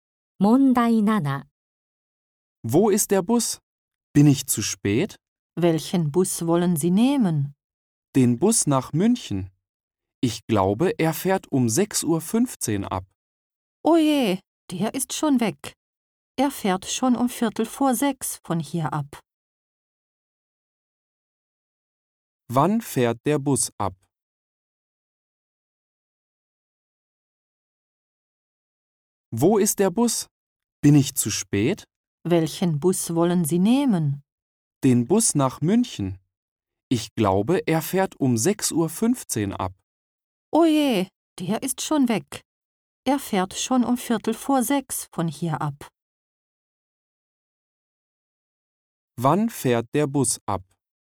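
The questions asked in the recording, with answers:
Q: Wann fährt der Bus ab?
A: Um 5:45 Uhr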